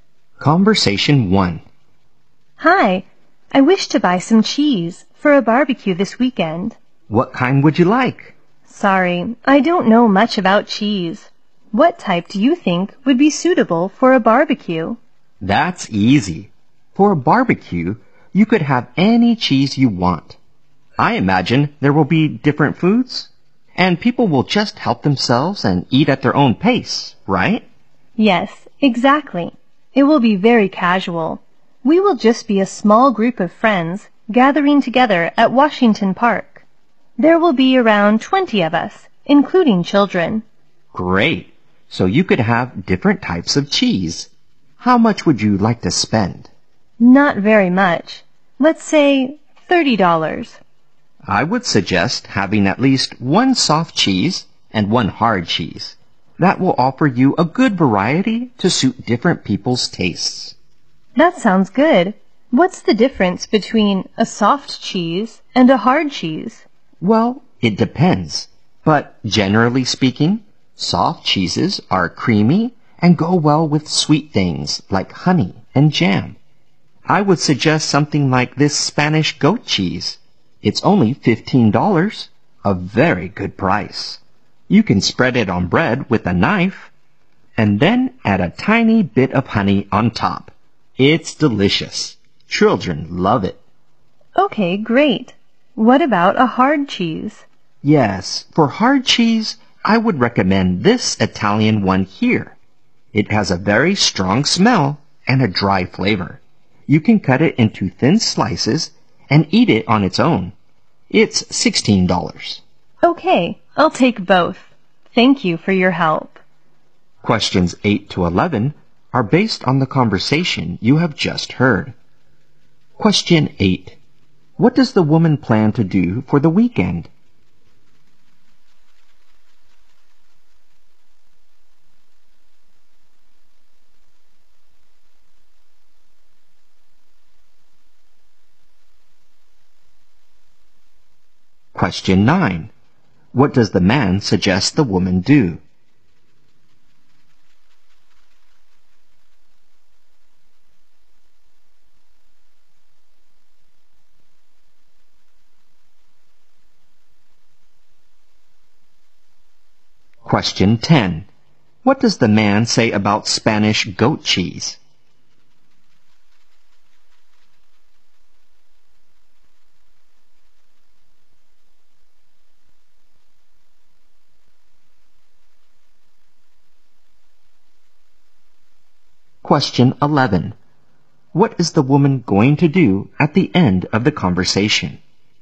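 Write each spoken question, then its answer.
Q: What does the woman plan to do for the weekend?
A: Have a barbecue with friends at Washington Park

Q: What does the man suggest the woman do?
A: Buy at least one soft cheese and one hard cheese

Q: What is the woman going to do at the end of the conversation?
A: Buy both cheeses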